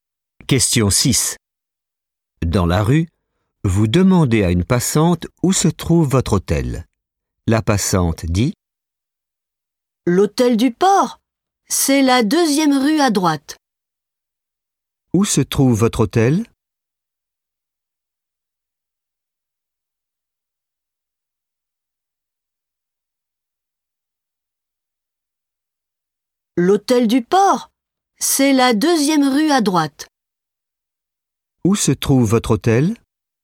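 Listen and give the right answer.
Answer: La deuxième rue à droite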